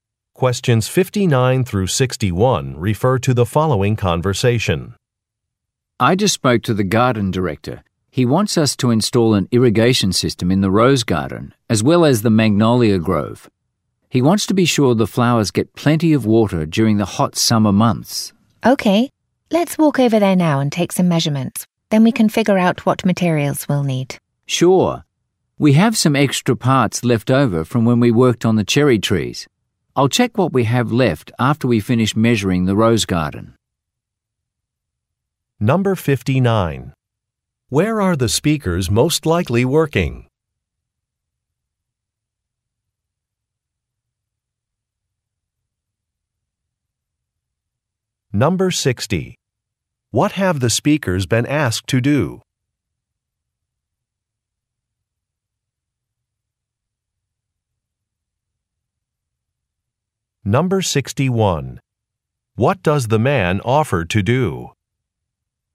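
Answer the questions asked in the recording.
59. At a garden
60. Install an irrigation system
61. Check the leftover parts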